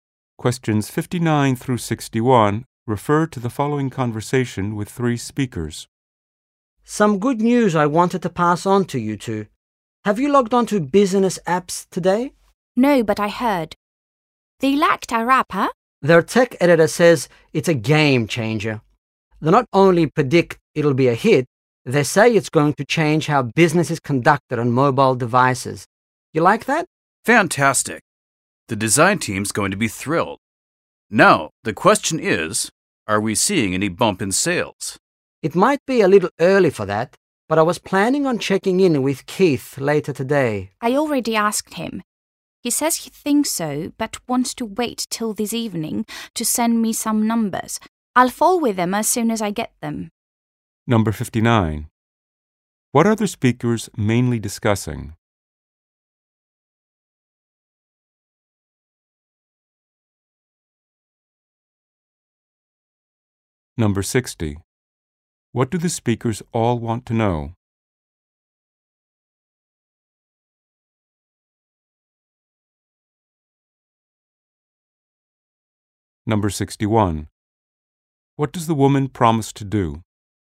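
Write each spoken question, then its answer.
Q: What are the speakers mainly discussing?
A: A good review of their app

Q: What do the speakers all want to know?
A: Whether sales have increased

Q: What does the woman promise to do?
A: Pass on the sales numbers when she gets them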